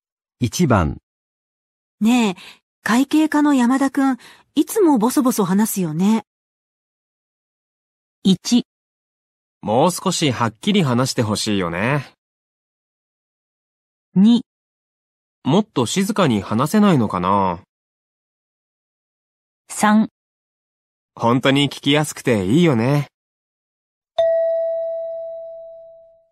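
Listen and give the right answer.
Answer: 1: もう少しはっきり話してほしいよね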